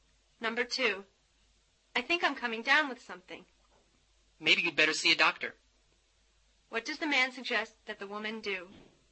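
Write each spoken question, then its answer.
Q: What does the man suggest that the woman do?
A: See a doctor.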